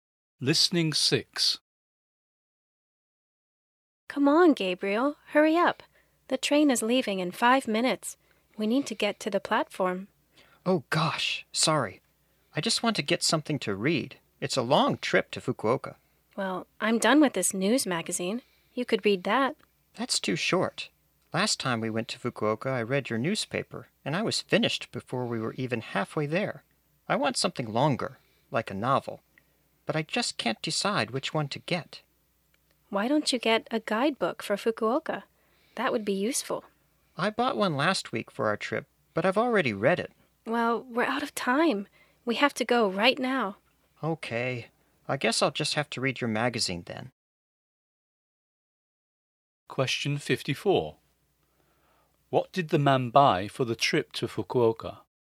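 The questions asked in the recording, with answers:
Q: What did the man buy for the trip to Fukuoka?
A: A guidebook for Fukuoka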